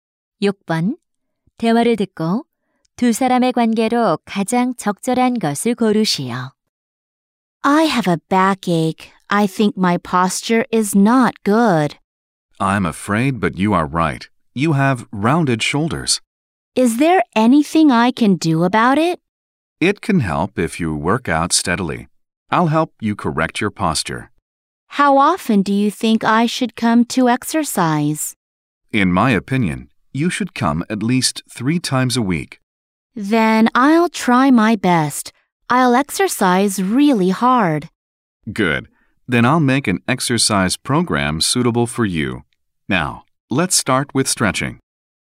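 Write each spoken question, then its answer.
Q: 대화를 듣고 두 사람의 관계로 가장 적절한 것을 고르시오.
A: 헬스 트레이너와 회원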